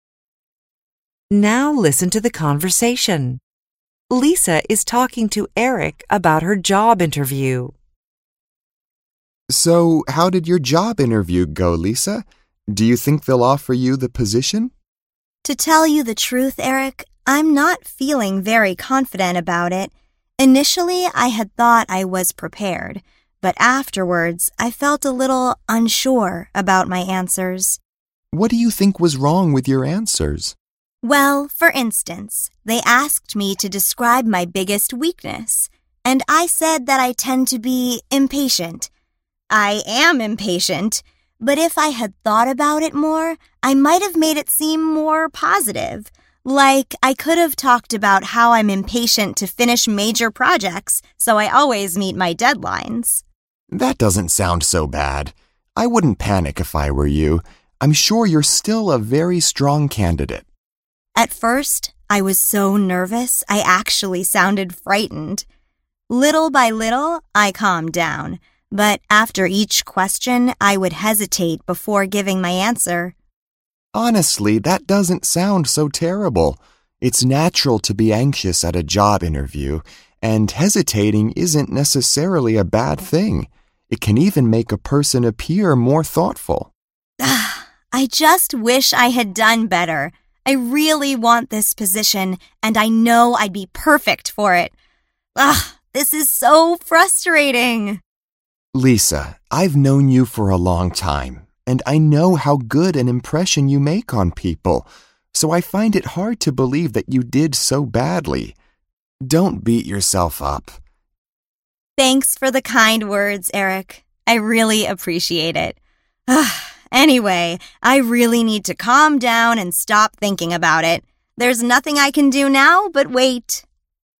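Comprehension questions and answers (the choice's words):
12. After Lisa's interview, she felt ____.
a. more optimistic than she did before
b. she was well prepared for it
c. uncertain about it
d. her answers sounded very confident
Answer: uncertain about it

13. During the interview, Lisa ____ .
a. recognized that she's an impatient person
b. said she tended to be too positive about things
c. admitted she didn't enjoy working on big projects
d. boasted that she always met her deadlines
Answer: recognized that she's an impatient person

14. According to Eric, ____ can make a person seem intelligent.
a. taking less time to answer a question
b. staying calm throughout an interview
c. speaking naturally and showing no anxiety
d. pausing before saying something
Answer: pausing before saying something

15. Lisa ____ .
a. thinks she could find a much better job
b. usually believes in miracles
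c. expects to be offered the position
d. feels frustrated about the situation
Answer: feels frustrated about the situation

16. Eric ____ .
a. agrees with Lisa's views on her performance at the interview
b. thinks people naturally have a good opinion about Lisa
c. is concerned that Lisa might quit her job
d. advises her not to be so proud of herself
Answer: thinks people naturally have a good opinion about Lisa

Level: ADVANCED HYBRID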